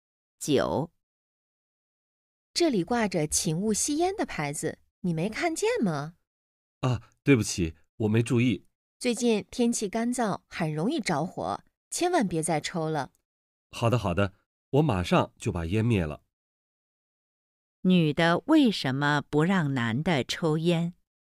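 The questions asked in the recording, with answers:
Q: 女的为什么不让男的抽烟?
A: 天气干燥,容易着火,且有禁烟牌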